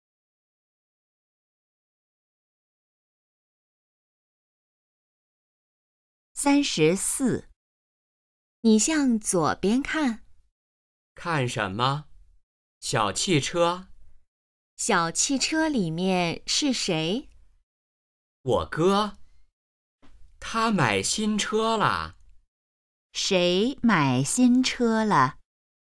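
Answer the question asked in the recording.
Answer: 哥哥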